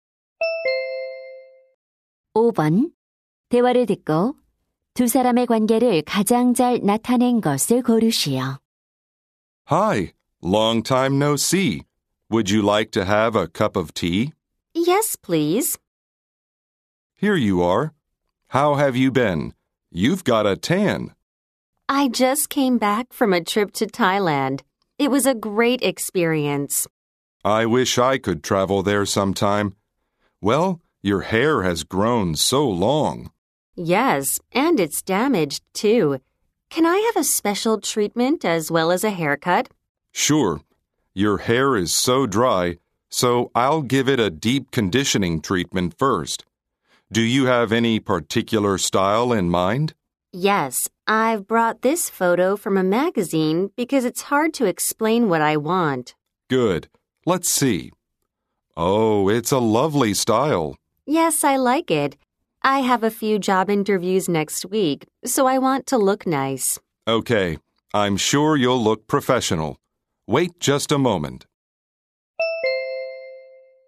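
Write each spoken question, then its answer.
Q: 대화를 듣고 두 사람의 관계를 가장 잘 나타낸 것을 고르시오.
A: 미용사 - 손님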